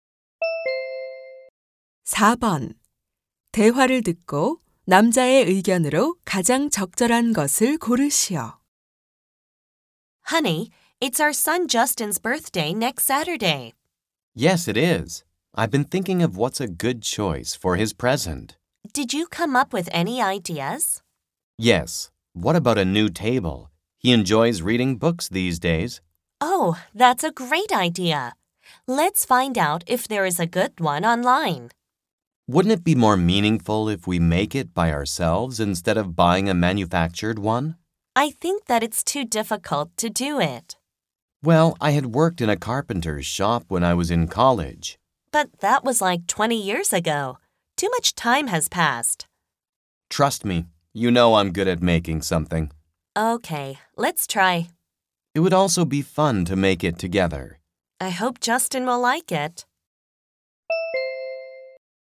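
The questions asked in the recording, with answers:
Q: 대화를 듣고 남자의 의견으로 가장 적절한 것을 고르시오.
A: 아들의 선물(탁자)을 사는 것보다 직접 만드는 것이 더 의미 있다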